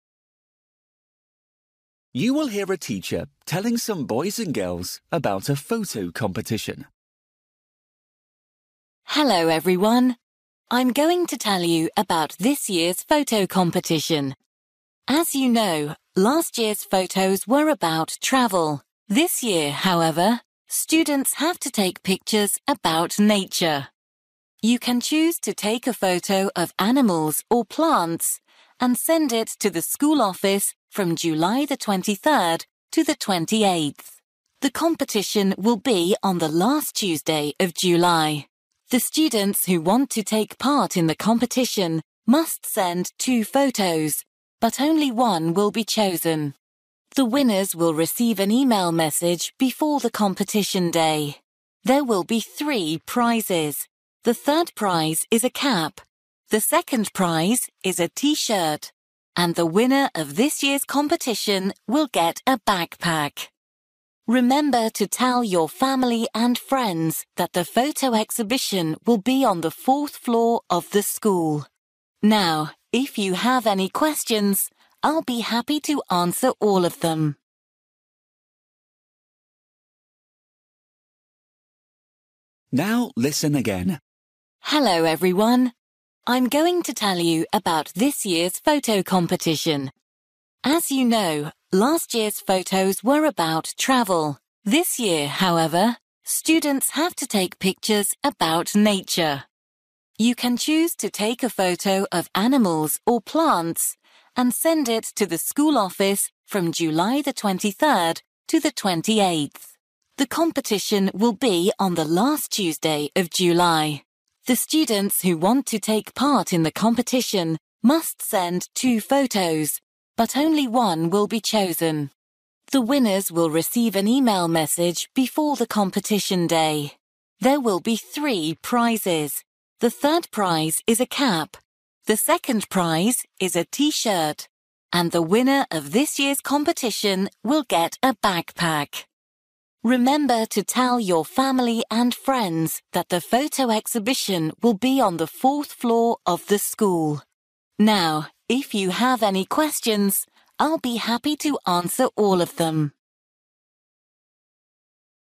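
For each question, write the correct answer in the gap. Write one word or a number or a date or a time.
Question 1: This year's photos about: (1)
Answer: nature

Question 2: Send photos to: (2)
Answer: school office

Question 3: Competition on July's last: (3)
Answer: Tuesday

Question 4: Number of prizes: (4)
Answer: 3

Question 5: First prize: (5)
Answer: backpack

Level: Luyện nghe trình độ A2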